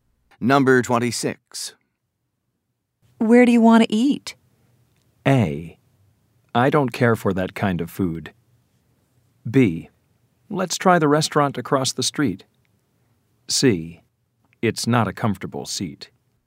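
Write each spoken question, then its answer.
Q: Where do you want to eat?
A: B: Let's try the restaurant across the street.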